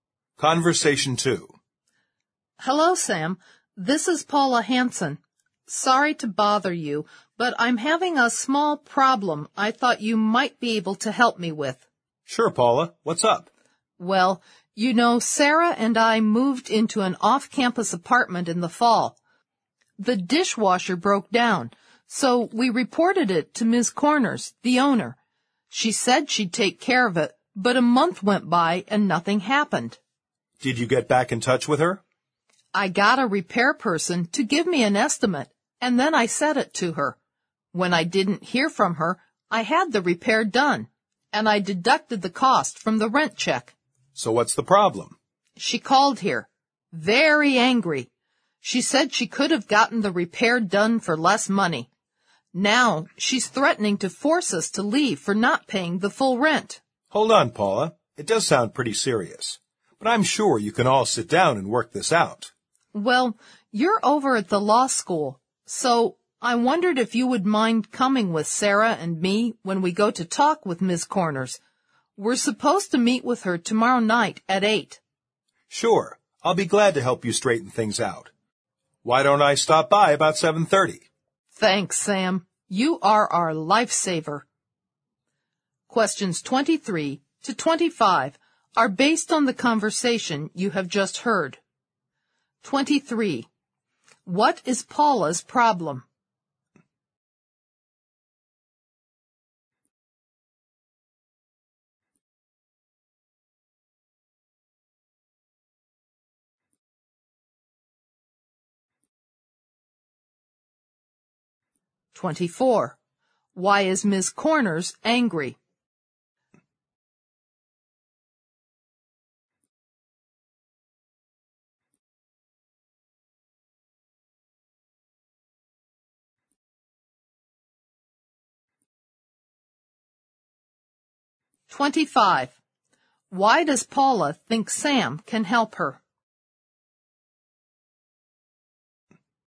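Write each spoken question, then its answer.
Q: What is Paula's problem?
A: She is being threatened with eviction by her landlady for deducting repair costs from the rent.

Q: Why is Ms. Corners angry?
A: Paula deducted the dishwasher repair cost from the rent; she could have had it repaired for less.

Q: Why does Paula think Sam can help her?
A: He studies at the law school.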